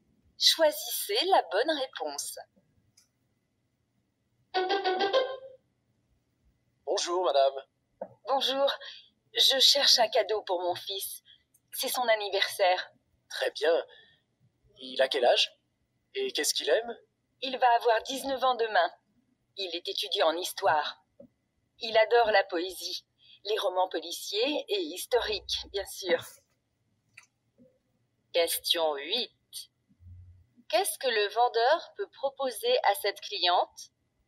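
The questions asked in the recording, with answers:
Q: Qu'est-ce que le vendeur peut proposer à cette cliente?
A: Un livre (poésie, roman policier ou historique)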